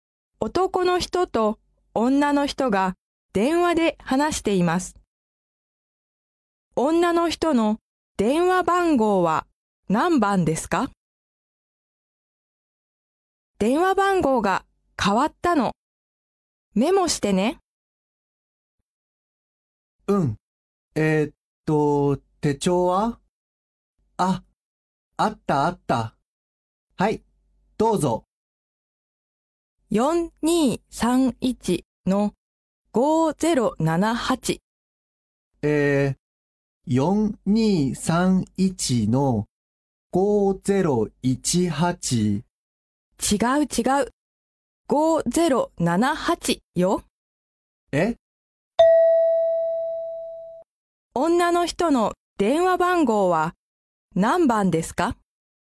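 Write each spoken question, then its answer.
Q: 女の人の電話番号は何番ですか?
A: 4231-5078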